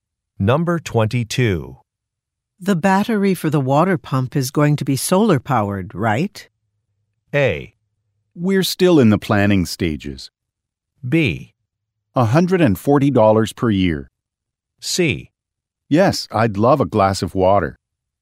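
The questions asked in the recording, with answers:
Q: The battery for the water pump is going to be solar-powered, right?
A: A: We're still in the planning stages.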